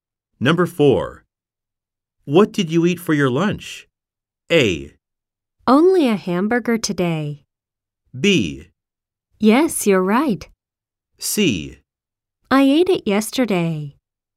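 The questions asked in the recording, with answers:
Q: What did you eat for your lunch?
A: A: Only a hamburger today.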